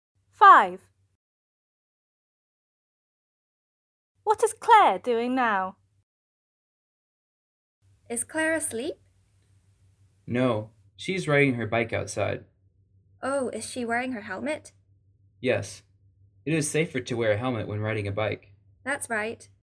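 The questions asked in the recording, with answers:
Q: What is Claire doing now?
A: Riding her bike outside, wearing a helmet.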